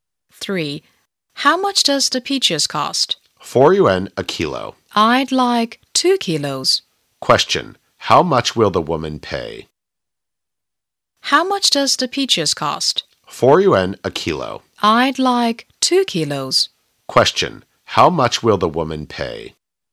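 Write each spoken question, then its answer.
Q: How much will the woman pay?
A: 8 yuan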